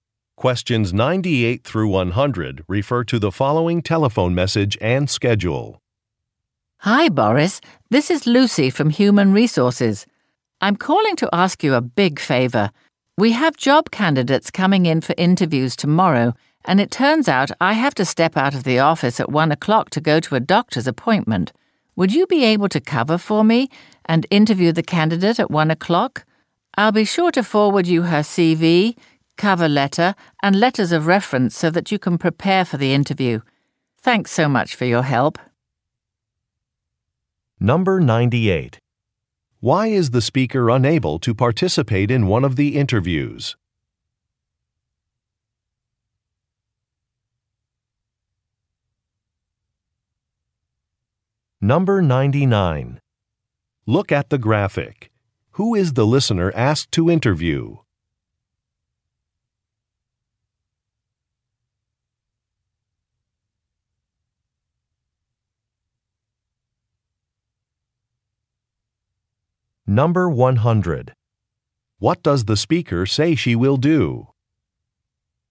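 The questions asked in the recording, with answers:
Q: Why is the speaker unable to participate in one of the interviews?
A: She has a doctor's appointment

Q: What does the speaker say she will do?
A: Forward the candidate's CV, cover letter, and letters of reference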